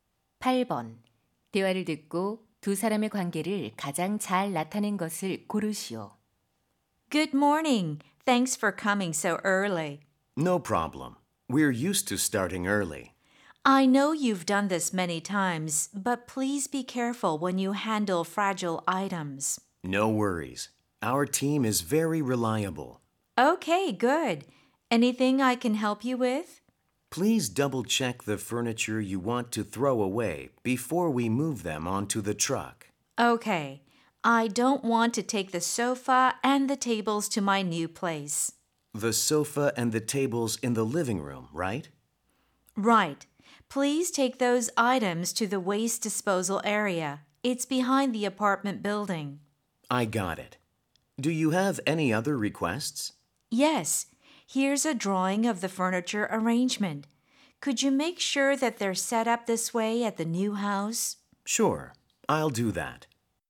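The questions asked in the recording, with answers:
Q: 대화를 듣고 두 사람의 관계를 가장 잘 나타낸 것을 고르시오.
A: 이사 의뢰인 - 이삿짐센터 직원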